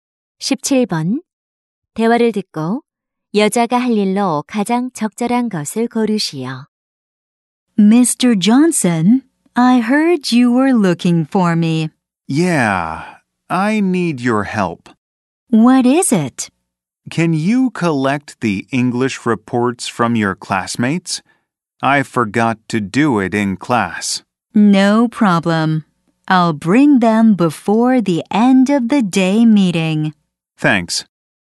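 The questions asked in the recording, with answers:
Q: 대화를 듣고 여자가 할 일로 가장 적절한 것을 고르시오.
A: 영어 보고서 걷기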